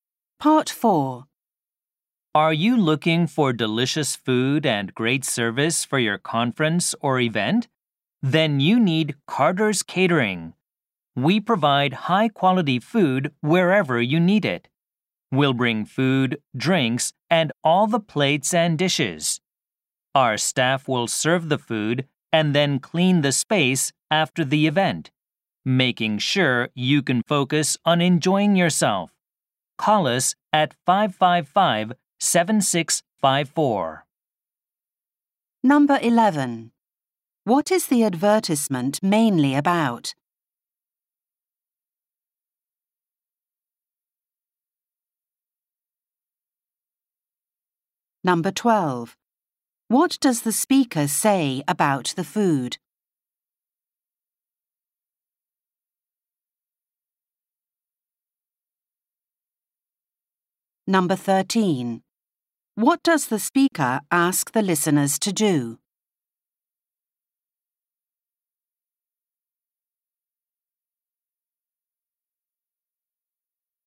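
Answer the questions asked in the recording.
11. A catering service
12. It is high-quality
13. Call 555-7654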